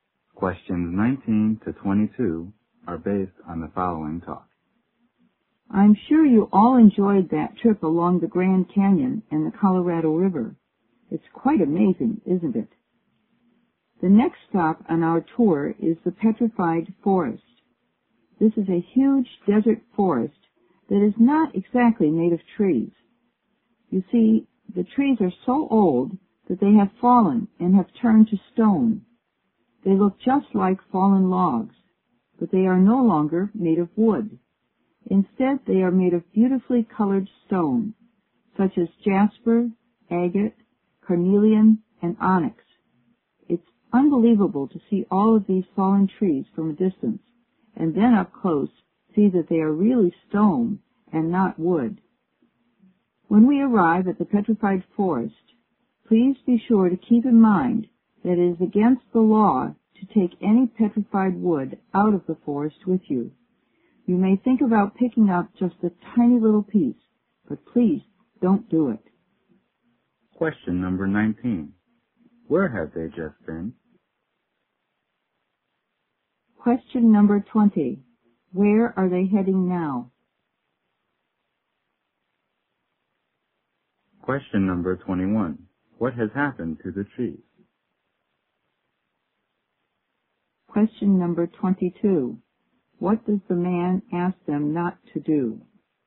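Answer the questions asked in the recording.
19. The Grand Canyon and the Colorado River
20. The Petrified Forest
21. They have fallen and turned to stone
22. Take any petrified wood out of the forest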